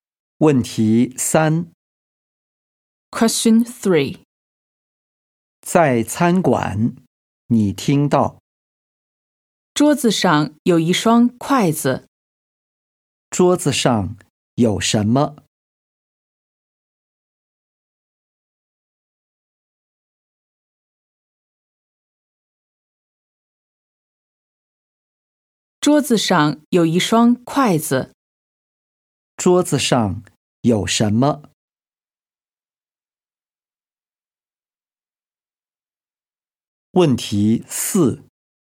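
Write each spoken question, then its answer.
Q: 桌子上有什么?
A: 一双筷子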